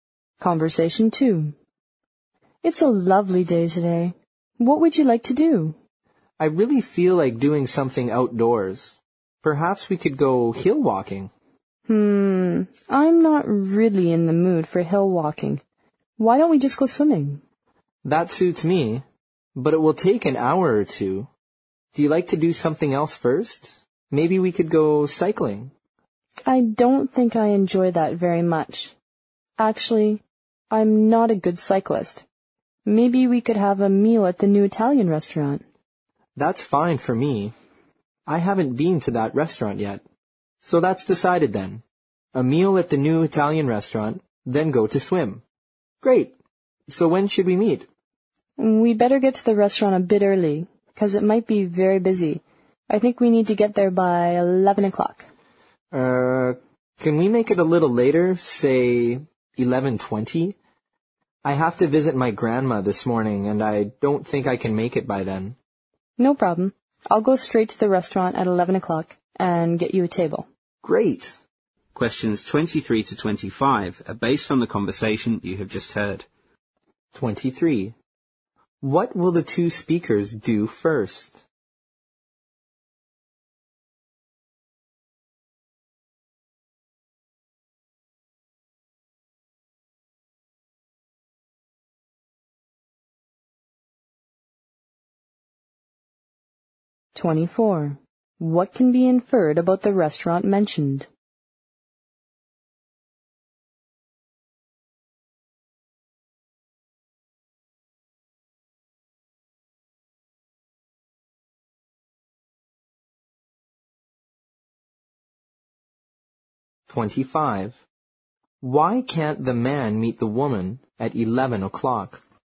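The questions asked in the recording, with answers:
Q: What will the two speakers do first?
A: Have a meal at the new Italian restaurant

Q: What can be inferred about the restaurant mentioned?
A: It might be very busy.

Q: Why can't the man meet the woman at 11 o'clock?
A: He has to visit his grandma that morning.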